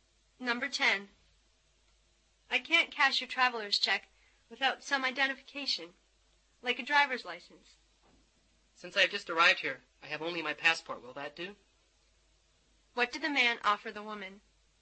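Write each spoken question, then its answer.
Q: What did the man offer the woman?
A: His passport.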